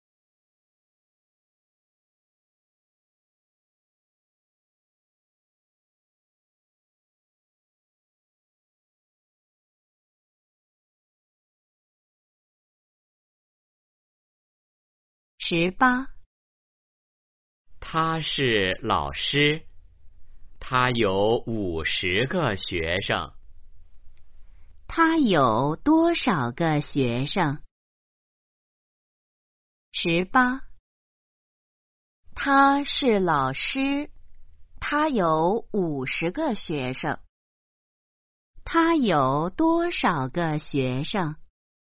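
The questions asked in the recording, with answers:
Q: 他有多少个学生?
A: 五十个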